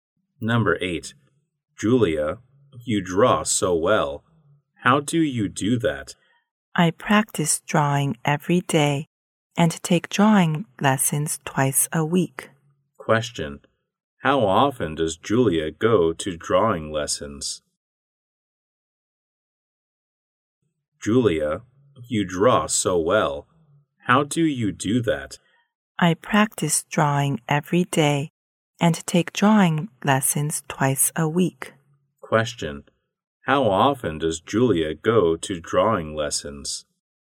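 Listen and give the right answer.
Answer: Twice a week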